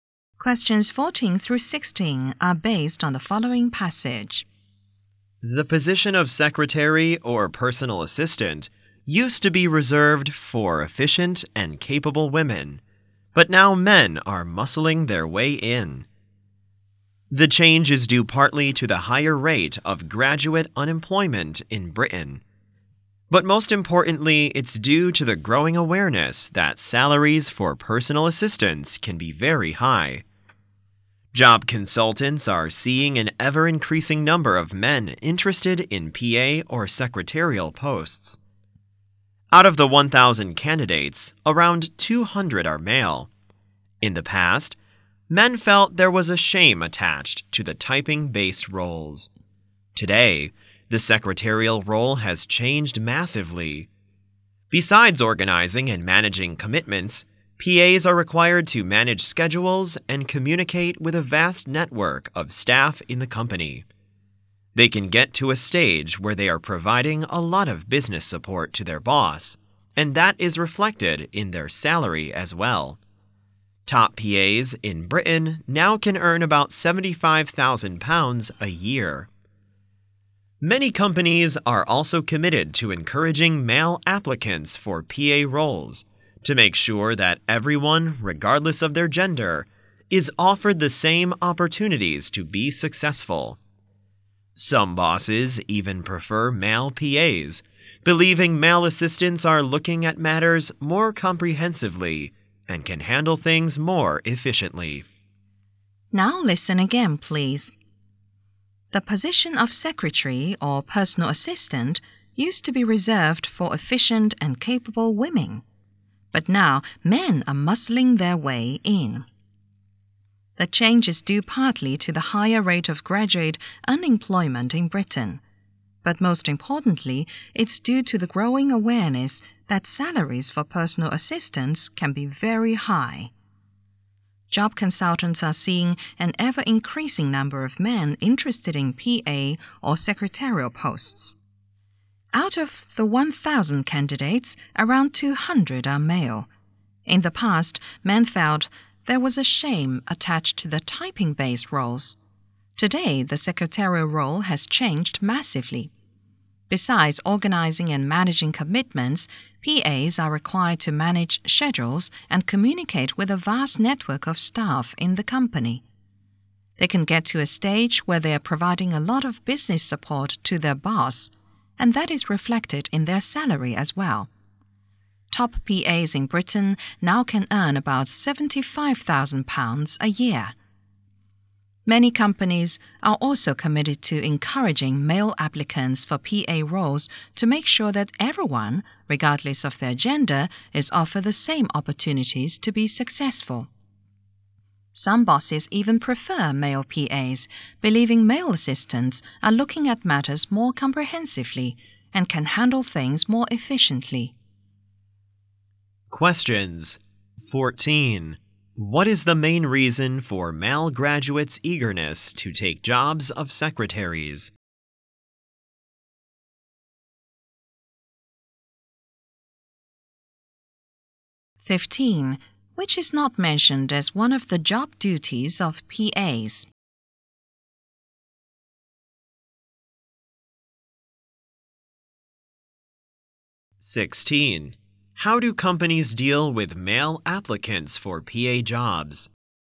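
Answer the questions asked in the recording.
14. Salaries for personal assistants can be very high.
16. They encourage them, offering everyone the same opportunities regardless of gender.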